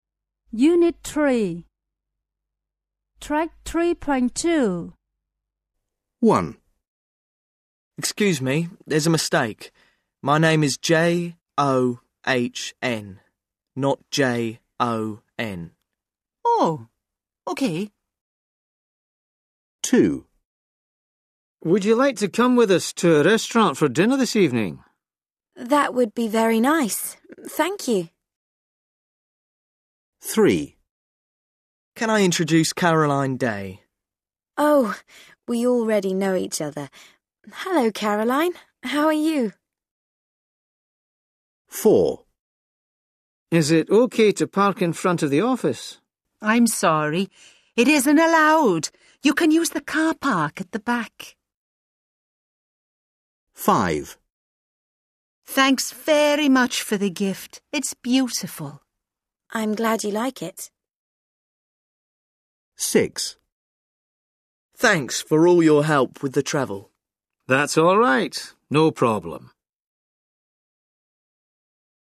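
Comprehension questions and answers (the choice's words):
Listen to six short conversations. How does the second person reply in each situation? Predict the meanings of their replies by choose the correct description in italics.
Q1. John points out a mistake. Jane ......[doesn't apologise] for it.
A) apologizes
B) doesn't apologise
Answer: doesn't apologise

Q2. Jack invites Barbara to dinner. Barbara ...... the invitation.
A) accepts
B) refuses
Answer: accepts

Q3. John introduces Caroline Day to Barbara. Barbara ...... her.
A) knows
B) doesn't know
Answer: knows

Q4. Jack asks if he is allowed to park in front of the office. Jane says that he .......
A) can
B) can't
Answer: can't

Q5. Barbara gives Jane a gift. Jane ...... it.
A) likes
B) doesn't like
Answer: likes

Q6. Jack helped John to arrange his travel. It ...... a problem for Jack.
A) was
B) wasn't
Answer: wasn't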